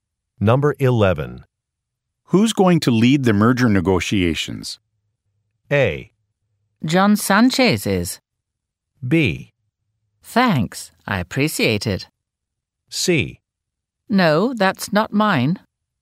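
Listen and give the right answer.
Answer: A: John Sanchez is.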